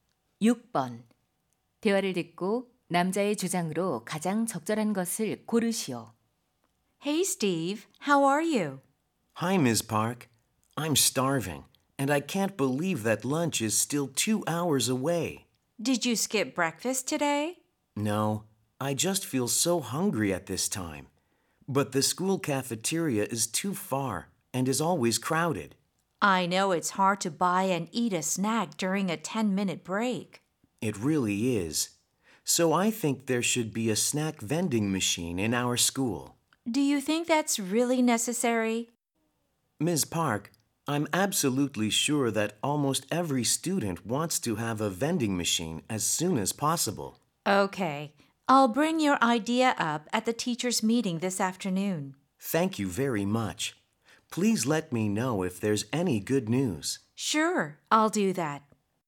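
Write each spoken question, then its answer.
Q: 대화를 듣고 남자의 주장으로 가장 적절한 것을 고르시오.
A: 학교에 간식 자판기를 설치해야 한다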